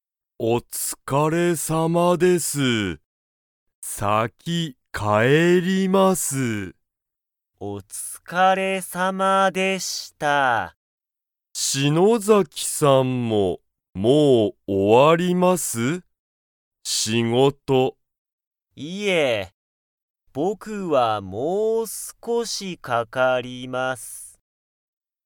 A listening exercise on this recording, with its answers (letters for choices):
Comprehension Quiz (Skip if you don't understand the conversation yet)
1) 篠崎(しのざき)さんは、もう仕事(しごと)が終(お)わりますか?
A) はい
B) いいえ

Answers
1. B

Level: Level 1